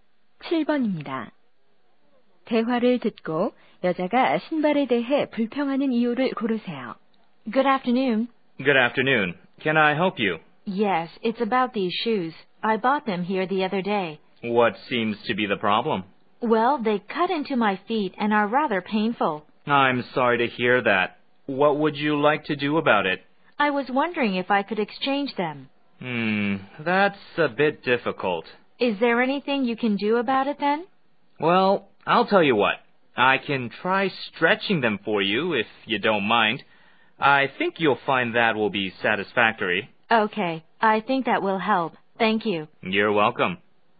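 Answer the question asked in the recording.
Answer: 신발이 발을 조여서 아프다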